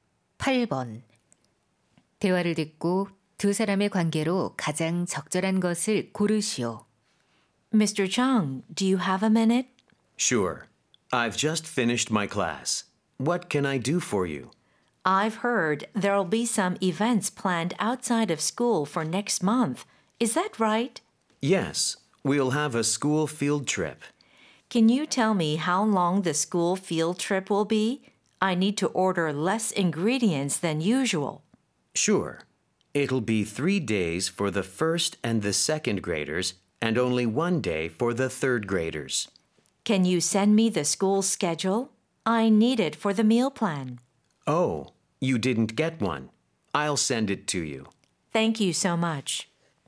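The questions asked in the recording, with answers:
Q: 대화를 듣고 두 사람의 관계로 가장 적절한 것을 고르시오.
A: 교사 - 영양사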